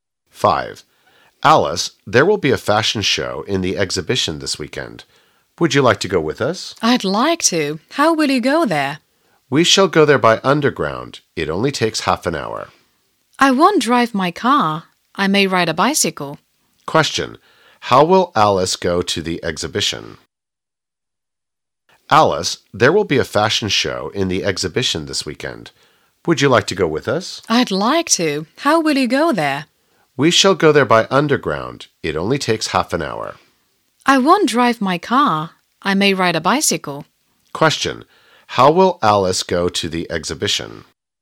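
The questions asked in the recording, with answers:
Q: How will Alice go to the exhibition?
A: By bicycle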